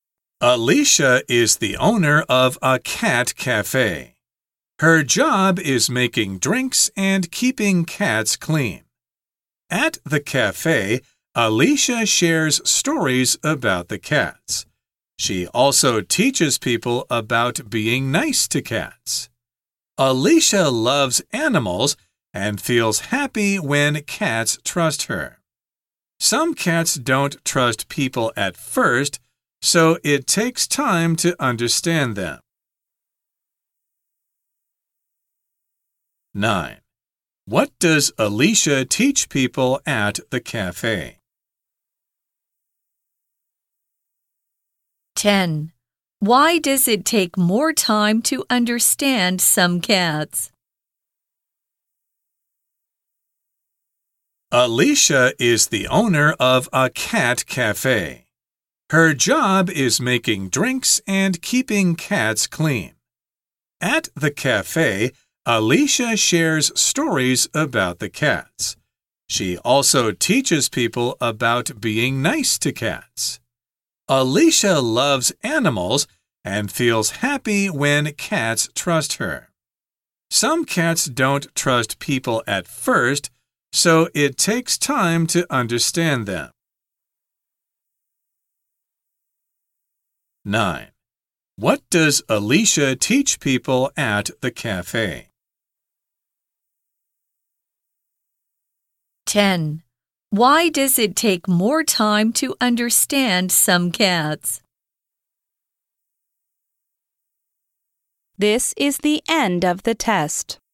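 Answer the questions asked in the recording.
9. How to be nice to cats
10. Because some cats don't trust people at first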